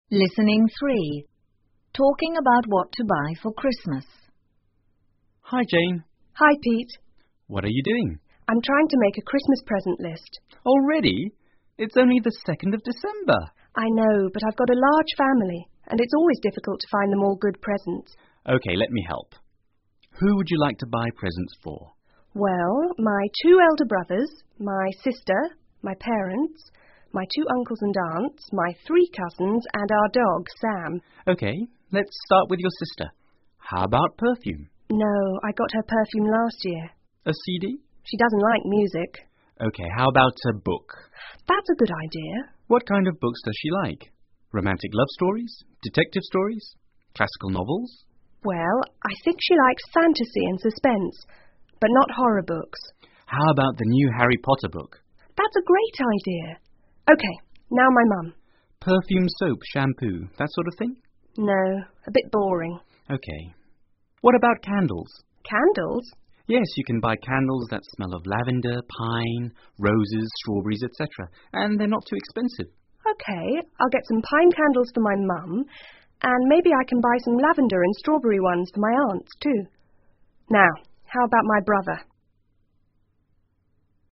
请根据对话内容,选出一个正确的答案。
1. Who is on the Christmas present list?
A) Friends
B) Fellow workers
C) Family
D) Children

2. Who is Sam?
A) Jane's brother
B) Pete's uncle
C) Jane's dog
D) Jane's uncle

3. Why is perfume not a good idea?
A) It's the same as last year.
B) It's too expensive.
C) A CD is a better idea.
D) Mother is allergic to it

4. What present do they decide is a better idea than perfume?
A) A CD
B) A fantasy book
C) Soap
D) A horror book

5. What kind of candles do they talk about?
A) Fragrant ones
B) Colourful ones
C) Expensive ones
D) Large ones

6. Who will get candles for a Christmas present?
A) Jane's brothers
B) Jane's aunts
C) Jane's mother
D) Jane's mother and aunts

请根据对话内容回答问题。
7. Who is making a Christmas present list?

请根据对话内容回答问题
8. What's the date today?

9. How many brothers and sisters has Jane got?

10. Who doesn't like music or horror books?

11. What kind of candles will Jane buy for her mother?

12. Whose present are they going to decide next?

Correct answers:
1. C
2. C
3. A
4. B
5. A
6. D
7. Jane
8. December the 2"a
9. Three
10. Jane's sister
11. Pine candles
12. Jane's brothers

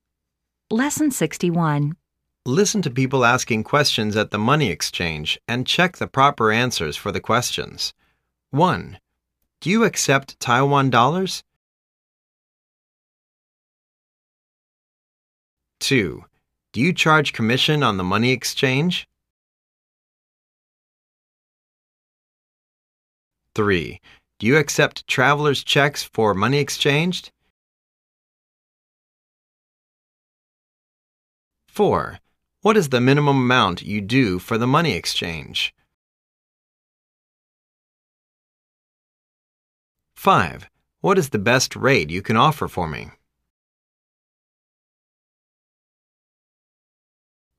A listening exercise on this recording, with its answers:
Listen to people asking questions at the money exchange and check the proper answers for the questions.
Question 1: Do you accept Taiwan dollars?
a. l'm sorry. We only accept cash.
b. l'm sorry. We only accept US dollar and Euro.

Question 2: Do you charge commission on the money exchange?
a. Yes. We charge l.5 % of the money you exchange.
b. Yes. We charge you 5% interest of the money you borrow.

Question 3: Do you accept travel checks for the money exchange?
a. Sorry, we only do cash exchange.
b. Sorry, cash is not available here.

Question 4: What is the minimum amount you do for the money exchange?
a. lt's not my business.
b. 10 US dollar at least.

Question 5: What is the best rate you can offer for me?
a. One Singapore dollar to twenty-th ree Taiwan dollar.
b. The best rate you can get is here.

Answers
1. b
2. a
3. a
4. b
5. a

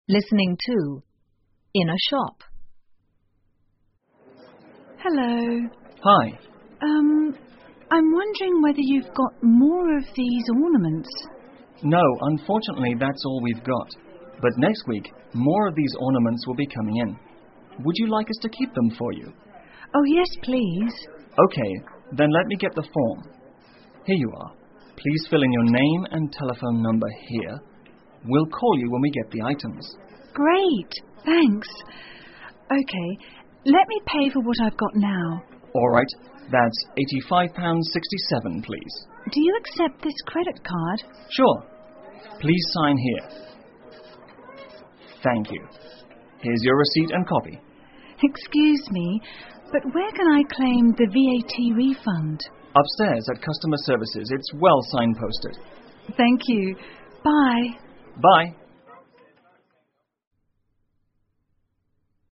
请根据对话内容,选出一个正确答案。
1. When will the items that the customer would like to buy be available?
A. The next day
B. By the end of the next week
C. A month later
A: B

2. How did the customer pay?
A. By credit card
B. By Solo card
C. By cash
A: A

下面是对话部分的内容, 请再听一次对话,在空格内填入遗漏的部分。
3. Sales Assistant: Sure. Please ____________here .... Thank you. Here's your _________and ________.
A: Sign, receipt, copy

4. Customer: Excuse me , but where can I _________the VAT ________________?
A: claim, refund

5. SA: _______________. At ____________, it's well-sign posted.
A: Upstairs, customer Services

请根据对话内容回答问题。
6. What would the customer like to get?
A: Ornaments

